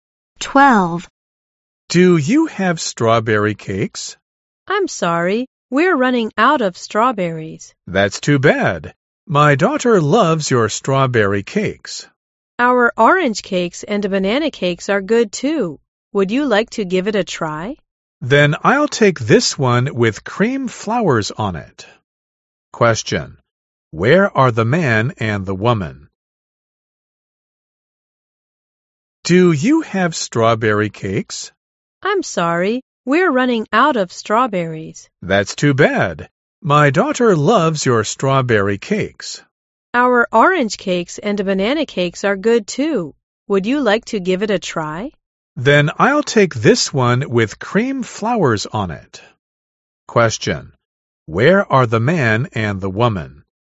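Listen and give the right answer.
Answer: At a cake shop (bakery)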